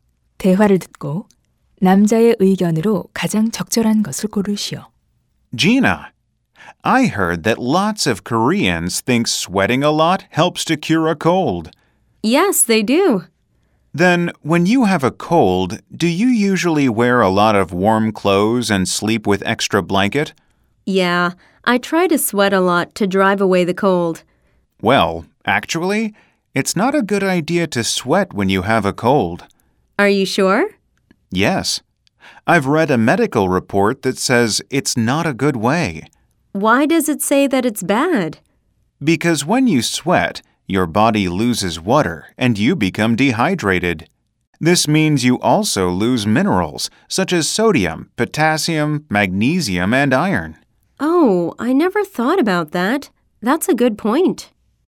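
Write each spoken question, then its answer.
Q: 대화를 듣고 남자의 의견으로 가장 적절한 것을 고르시오.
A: 감기에 걸렸을 때 땀을 많이 흘리는 것은 좋지 않다.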